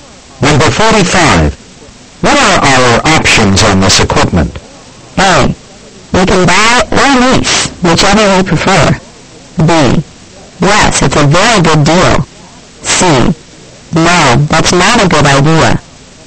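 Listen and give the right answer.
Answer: A: We can buy or lease, whichever we prefer.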